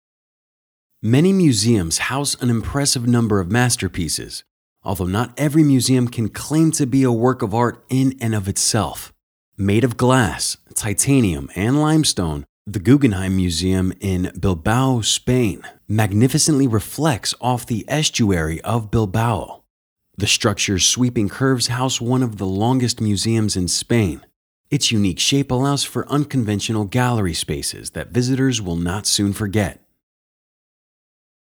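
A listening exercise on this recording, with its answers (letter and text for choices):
Listen to the audio and answer the question.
Which of the following best describes the tone of the audio passage?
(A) Vilifying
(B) Laudatory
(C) Compromising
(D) Disparaging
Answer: (B) Laudatory

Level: C1 Advanced English Test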